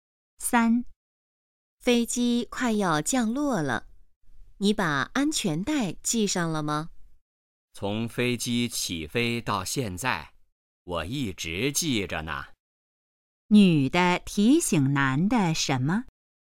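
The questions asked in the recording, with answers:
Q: 女的提醒男的什么?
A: 系上安全带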